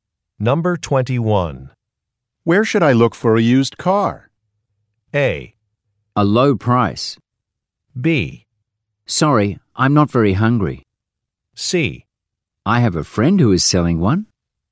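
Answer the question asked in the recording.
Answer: C: I have a friend who is selling one.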